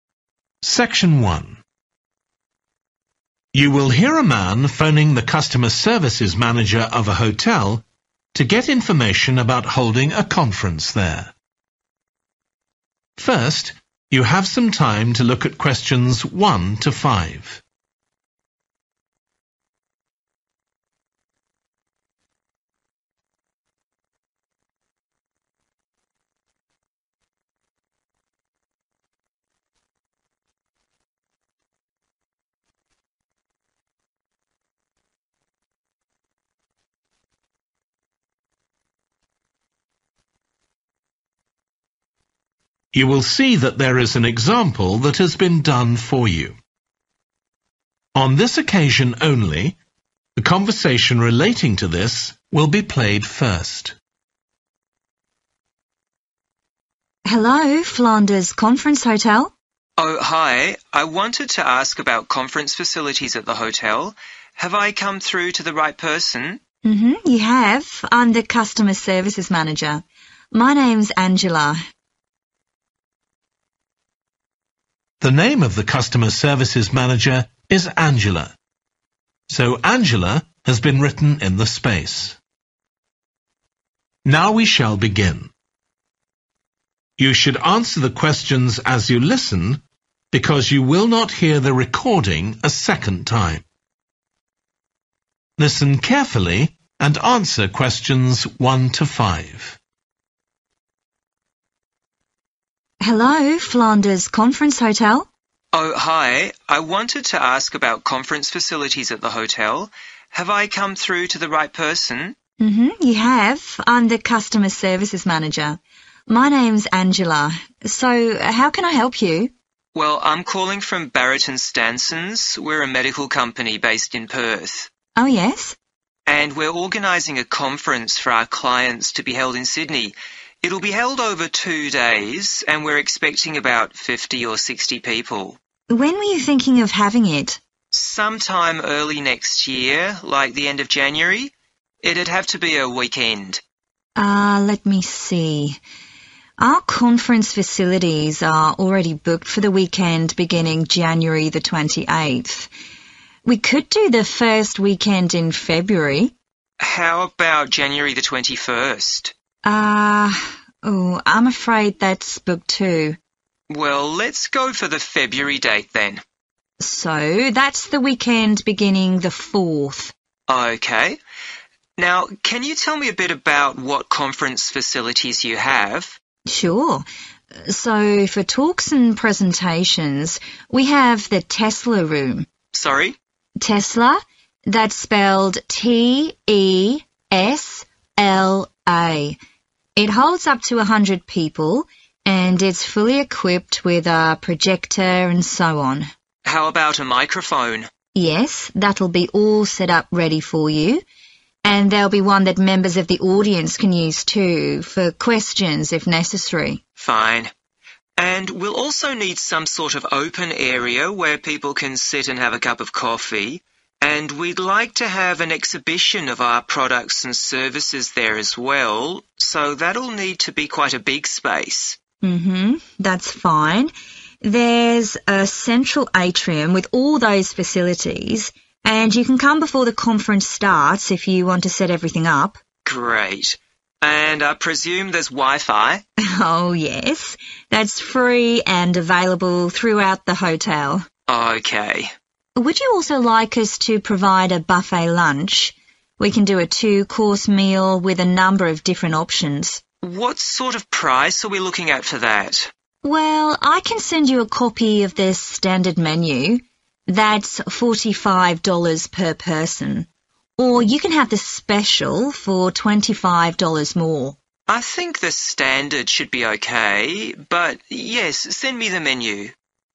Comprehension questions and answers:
Complete the notes below. Write ONE WORD AND/OR A NUMBER for each answer.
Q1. ● the 1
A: Tesla

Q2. room for talks (projector and 2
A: microphone

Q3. available) ● area for coffee and an 3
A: exhibition

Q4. ● free 4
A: wifi

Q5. throughout ● a standard buffet lunch costs $ 5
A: 45

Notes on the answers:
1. So for talks and presentations we have the Tesla room. [Vì vậy, đối với các cuộc nói chuyện và thuyết trình, chúng tôi có phòng Tesla].
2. How about a microphone? [Thế còn một chiếc micro thì sao?]
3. And we'll also need some sort of open area where people can sit and have a cup of coffee, and we'd like to have an exhibition [Chúng tôi cũng sẽ cần một chút không gian mở để mọi người có thể ngồi uống cà phê, và chúng tôi muốn có một buổi triển lãm]
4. And I presume there's wifi? [Và tôi cho là ở đây có wifi?]